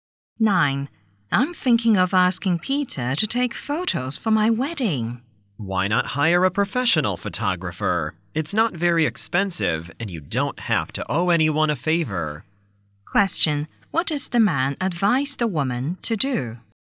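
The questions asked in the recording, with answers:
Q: What does the man advise the woman to do?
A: Hire a professional photographer.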